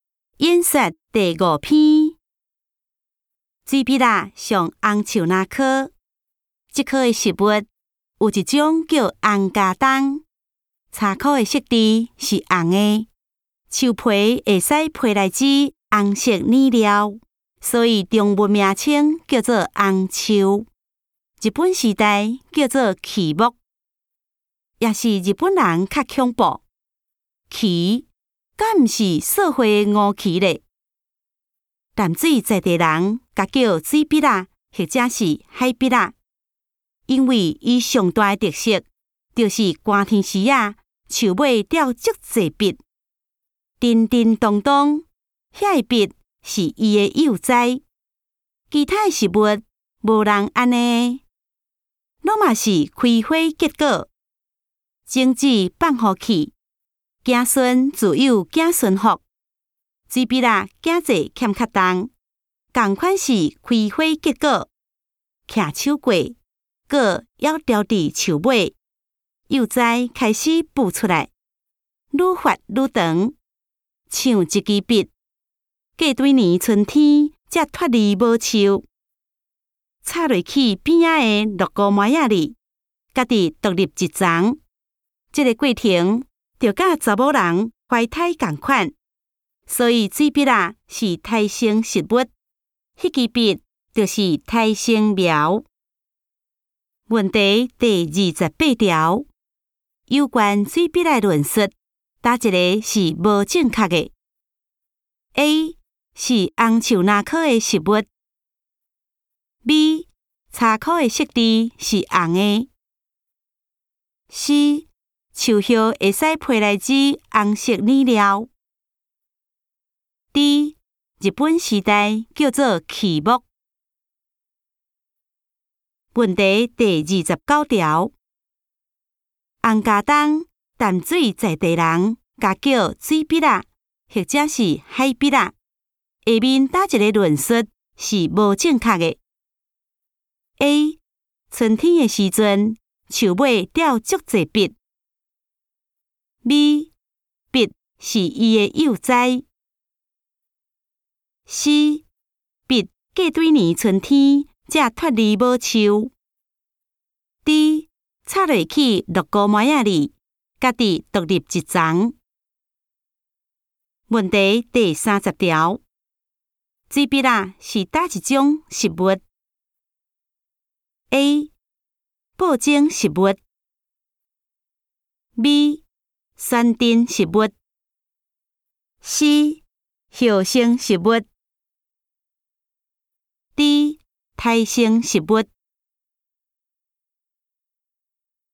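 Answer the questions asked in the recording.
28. C: 树叶会使配来枝红色染料。
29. A: 春天的时阵,树尾掉足济笔。
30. D: 胎生食物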